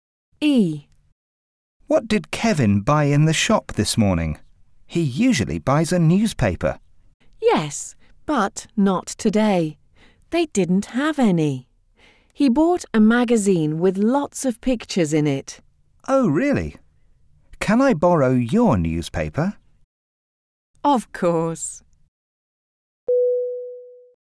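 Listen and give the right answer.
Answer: A magazine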